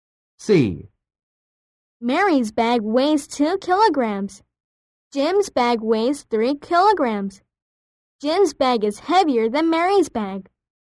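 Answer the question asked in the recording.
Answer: True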